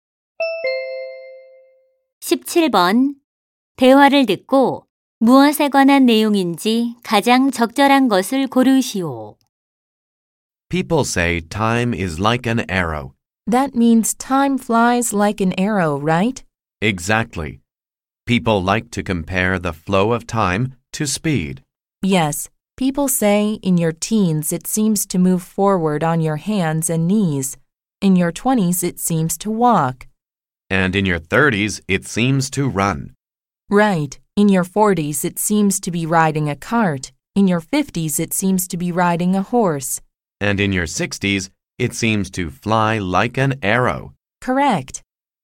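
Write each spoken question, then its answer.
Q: 대화를 듣고 무엇에 관한 내용인지 가장 적절한 것을 고르시오.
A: 나이에 따라 다르게 느껴지는 시간의 속도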